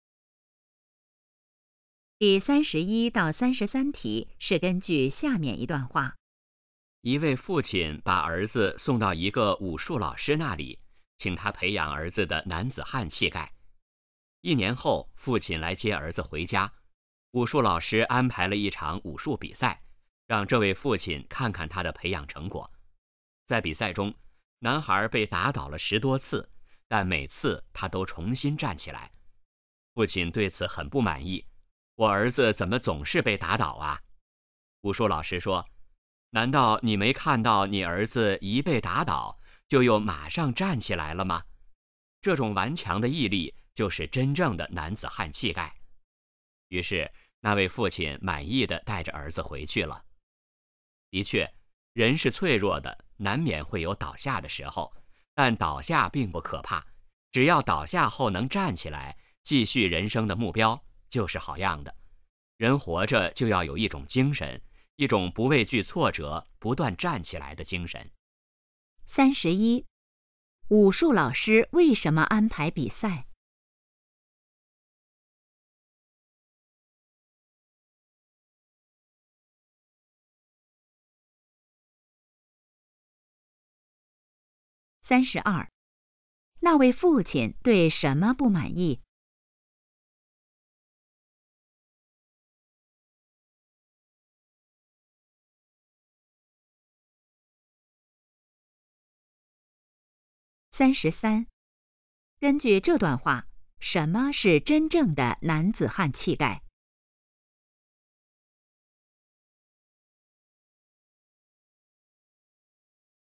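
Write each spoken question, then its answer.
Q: 武术老师为什么安排比赛?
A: 让父亲看看培养成果

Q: 那位父亲对什么不满意?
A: 儿子总是被打倒

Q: 根据这段话,什么是真正的男子汉气概?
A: 被打倒后马上站起来的顽强毅力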